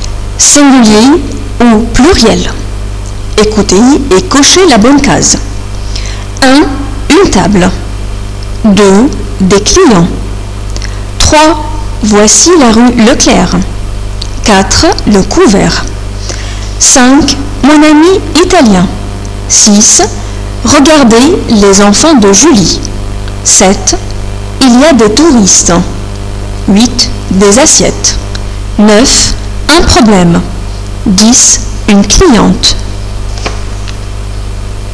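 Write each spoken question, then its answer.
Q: Une table.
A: singulier

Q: Des clients.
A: pluriel

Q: Voici la rue Leclerc.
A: singulier

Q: Le couvert.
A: singulier

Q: Mon ami italien.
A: singulier

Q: Regardez les enfants de Julie.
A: pluriel

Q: Il y a des touristes.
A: pluriel

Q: Des assiettes.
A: pluriel

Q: Un problème.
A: singulier

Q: Une cliente.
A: singulier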